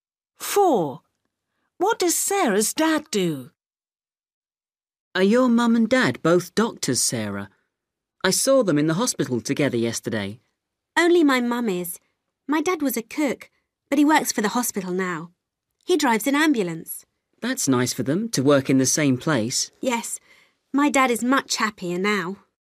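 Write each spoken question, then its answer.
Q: What does Sarah's dad do?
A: He drives an ambulance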